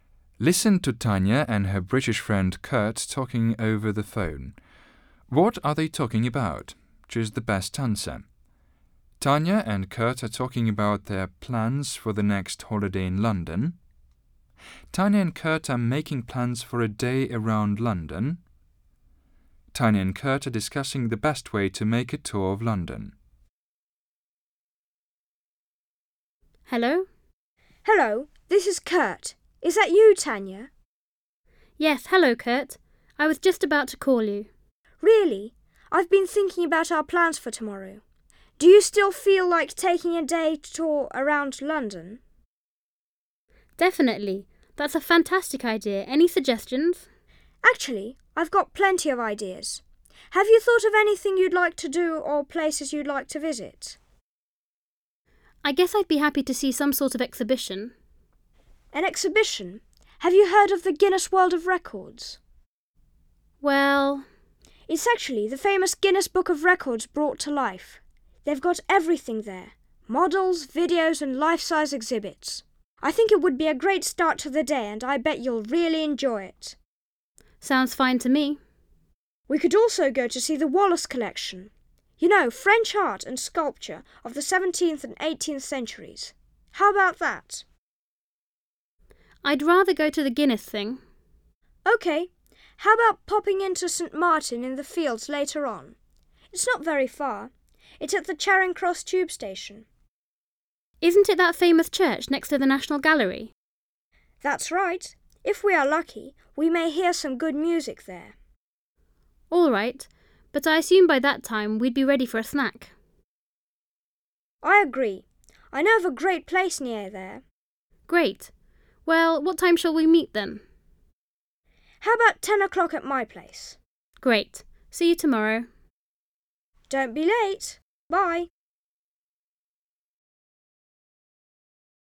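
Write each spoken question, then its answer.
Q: What are they talking about?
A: Tanya and Kurt are making plans for a day around London.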